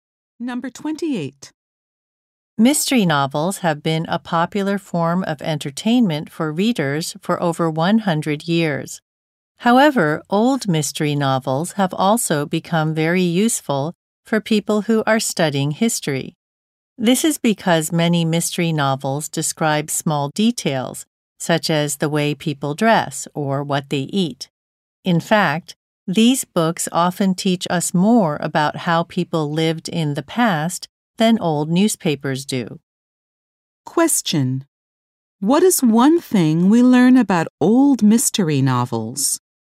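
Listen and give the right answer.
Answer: They are useful for studying history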